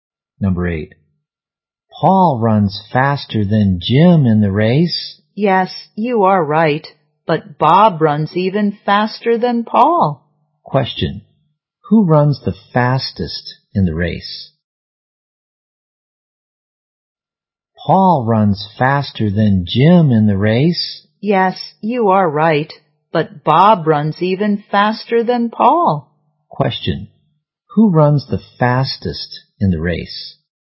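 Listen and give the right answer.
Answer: Bob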